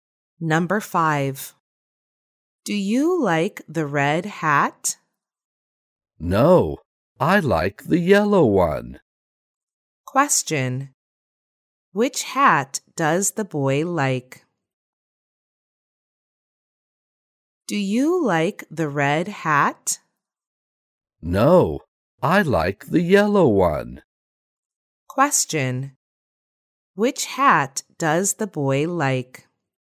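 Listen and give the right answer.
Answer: The yellow one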